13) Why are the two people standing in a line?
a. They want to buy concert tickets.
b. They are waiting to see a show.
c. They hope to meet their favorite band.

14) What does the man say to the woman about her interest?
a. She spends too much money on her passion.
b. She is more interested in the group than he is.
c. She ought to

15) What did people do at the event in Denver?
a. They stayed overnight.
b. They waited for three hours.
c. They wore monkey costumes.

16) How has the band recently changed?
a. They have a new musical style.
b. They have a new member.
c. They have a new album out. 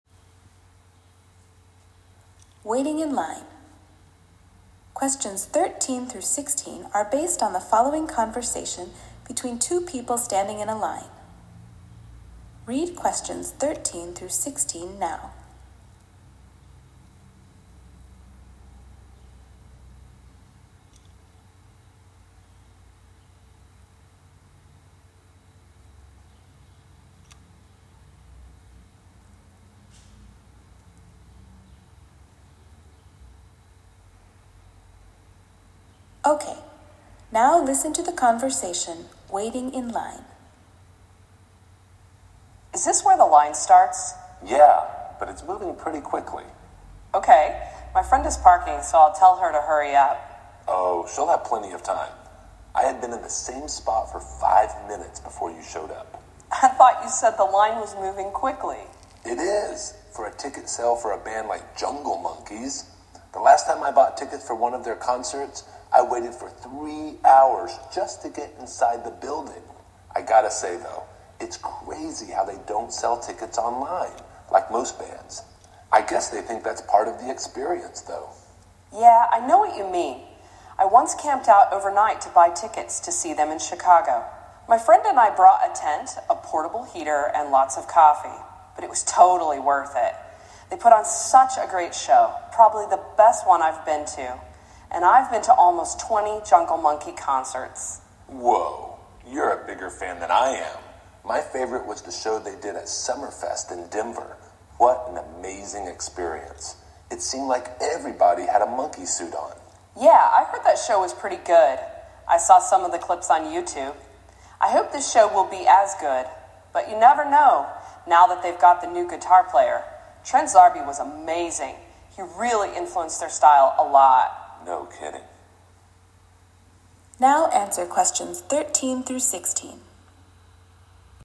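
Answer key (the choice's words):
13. They want to buy concert tickets.
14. She is more interested in the group than he is.
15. They wore monkey costumes.
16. They have a new member.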